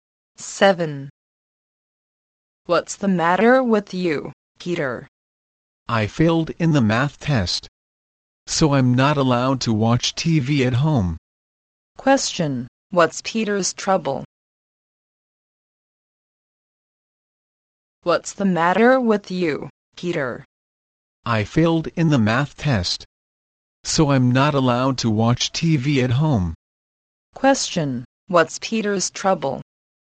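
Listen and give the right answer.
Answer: He failed the math test and isn't allowed to watch TV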